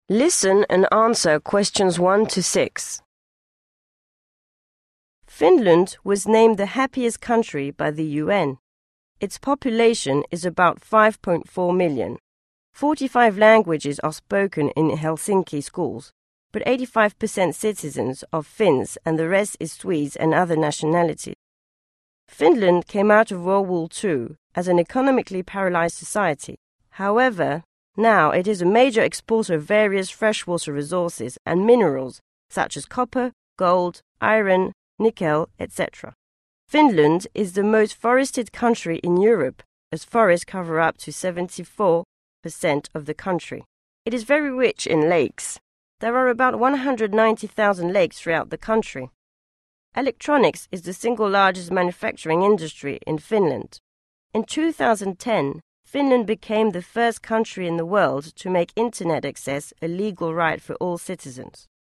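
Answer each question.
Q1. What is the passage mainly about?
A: Facts about Finland

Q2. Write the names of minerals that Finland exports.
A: copper, gold, iron, nickel

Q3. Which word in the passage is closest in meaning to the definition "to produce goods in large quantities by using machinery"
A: manufacturing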